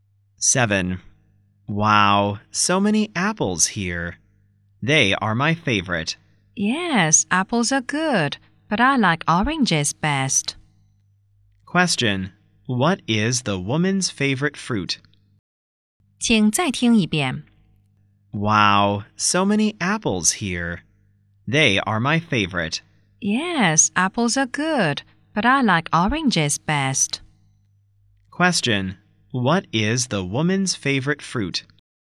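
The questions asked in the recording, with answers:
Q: What is the woman's favorite fruit?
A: Oranges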